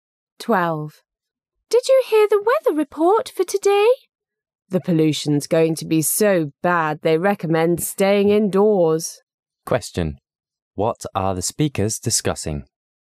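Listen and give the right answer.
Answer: The air pollution in today's weather report.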